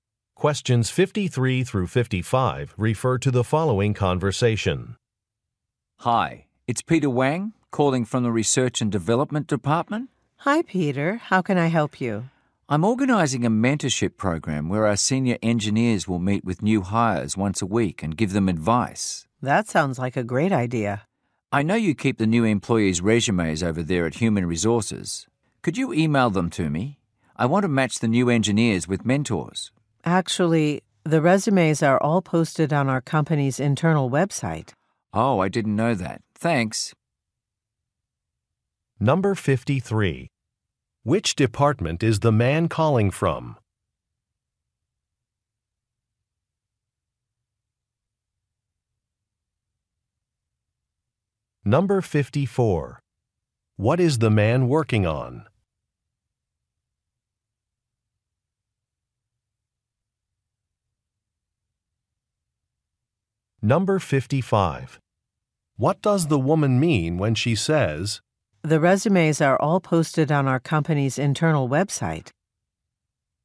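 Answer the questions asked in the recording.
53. Research and Development.
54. A mentorship program.
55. He can get the resumes himself online.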